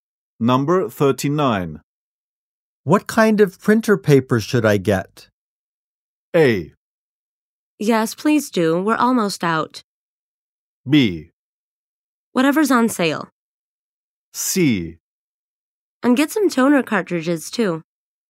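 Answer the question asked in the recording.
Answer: B: Whatever's on sale.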